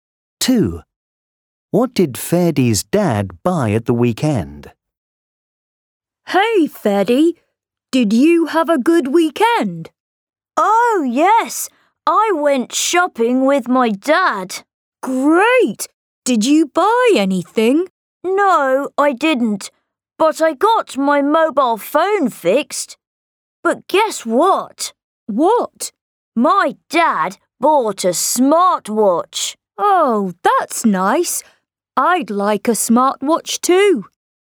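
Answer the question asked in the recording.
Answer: A smartwatch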